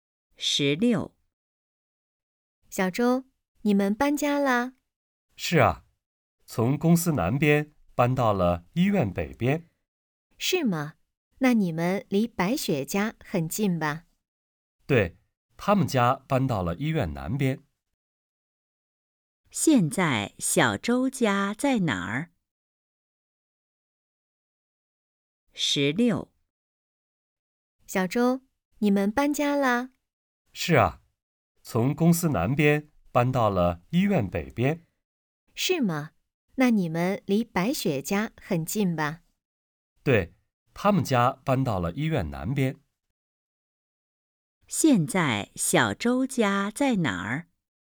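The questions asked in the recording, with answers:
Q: 现在小周家在哪儿?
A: 医院北边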